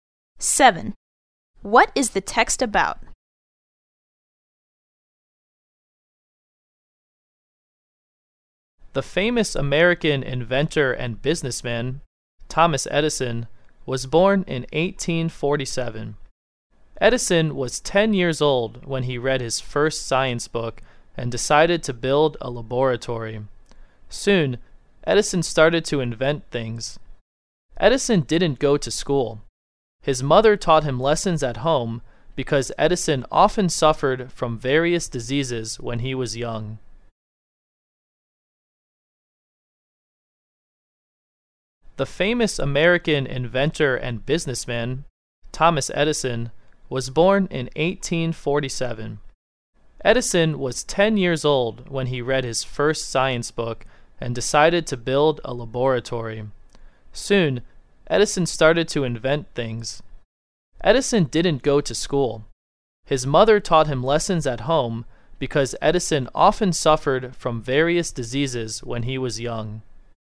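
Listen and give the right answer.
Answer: Thomas Edison's childhood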